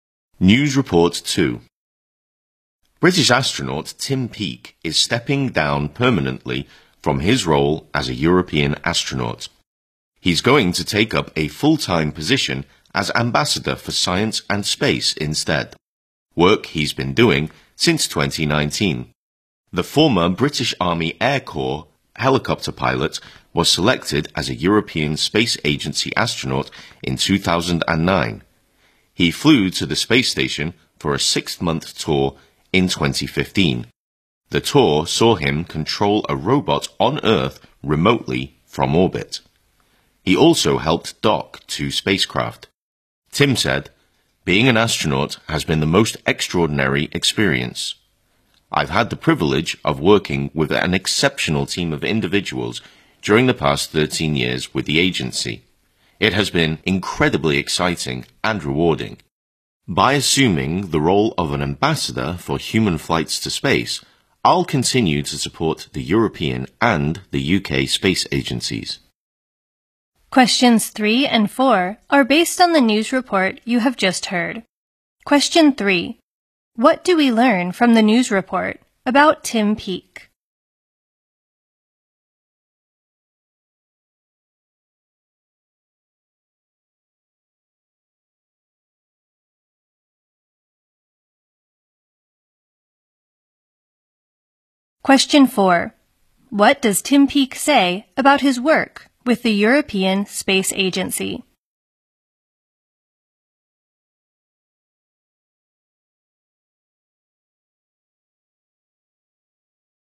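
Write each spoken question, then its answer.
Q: What do we learn from the news report about Tim Peake?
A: He is stepping down as a European astronaut to become Ambassador for Science and Space

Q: What does Tim Peake say about his work with the European Space Agency?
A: It has been incredibly exciting and rewarding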